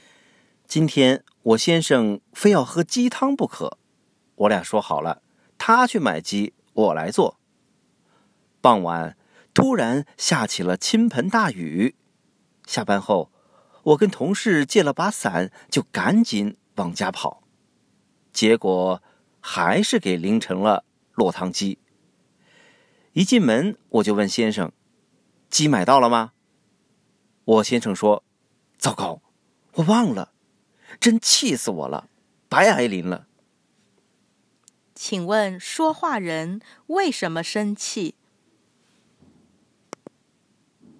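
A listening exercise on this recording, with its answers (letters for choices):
Listen to the audio texts and questions, tick ONE correct answer to each question.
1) Why was the speaker upset?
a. She forgot the umbrella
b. Her husband forgot to buy chicken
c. She had to cook chicken soup for her husband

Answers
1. b

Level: Advanced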